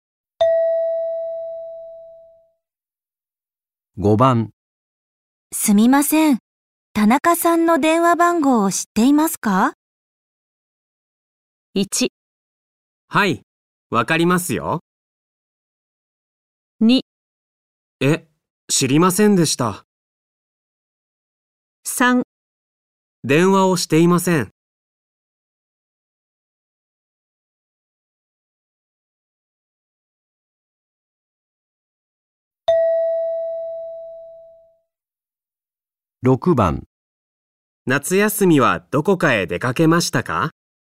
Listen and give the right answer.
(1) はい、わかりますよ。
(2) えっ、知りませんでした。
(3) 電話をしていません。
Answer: (1) はい、わかりますよ。

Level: N5 Listening · Test 1